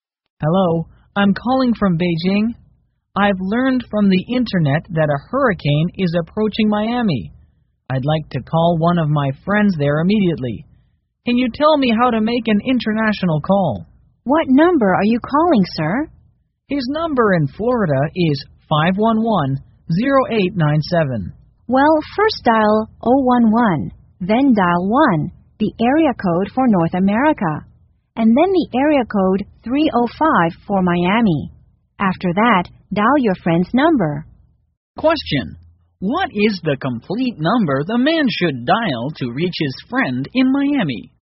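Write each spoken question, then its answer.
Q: What is the complete number the man should dial to reach his friend in Miami?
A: 011-1-305-511-0897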